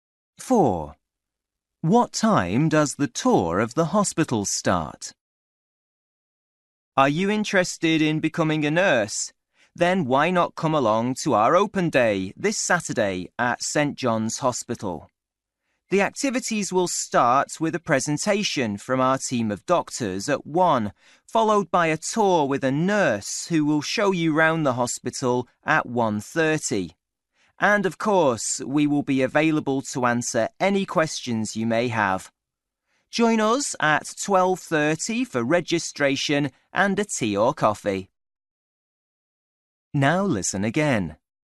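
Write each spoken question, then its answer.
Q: What time does the tour of the hospital start?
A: 1:30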